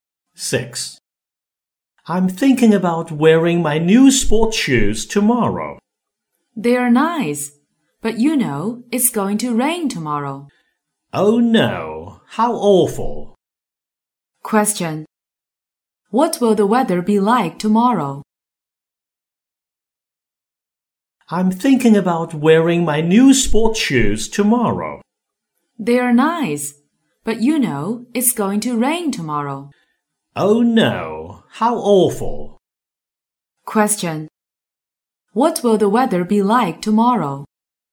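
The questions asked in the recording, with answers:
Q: What will the weather be like tomorrow?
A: It will be rainy.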